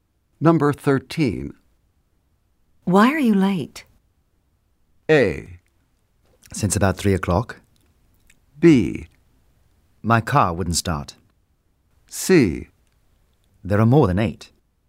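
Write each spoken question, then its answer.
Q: Why are you late?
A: B: My car wouldn't start.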